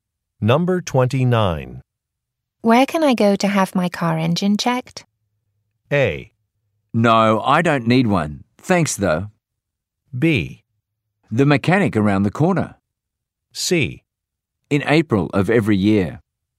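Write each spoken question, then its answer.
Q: Where can I go to have my car engine checked?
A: B: The mechanic around the corner.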